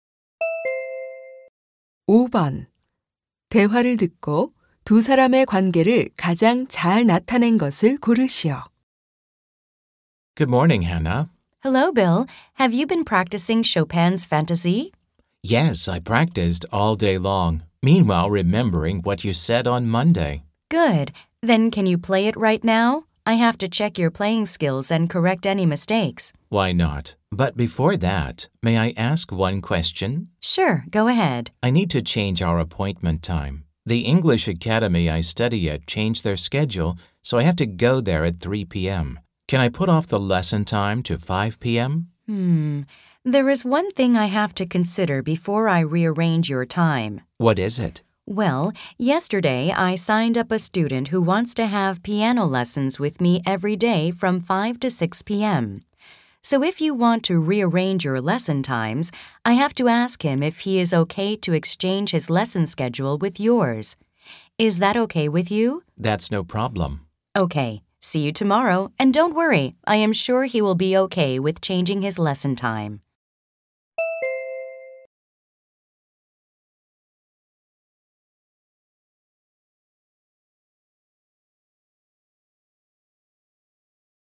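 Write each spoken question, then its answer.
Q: 대화를 듣고 두 사람의 관계를 가장 잘 나타낸 것을 고르시오.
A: 피아노 선생님과 학생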